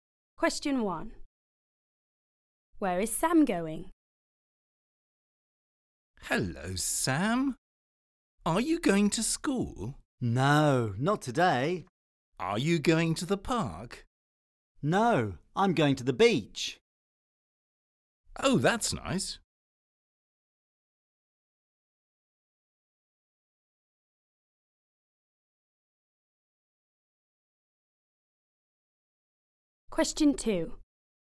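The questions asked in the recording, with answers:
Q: Where is Sam going?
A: To the beach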